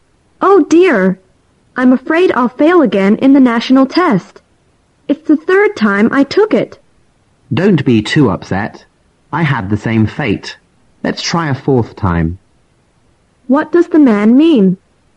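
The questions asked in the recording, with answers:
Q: What does the man mean?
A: He has also failed the test three times and suggests they try again together a fourth time.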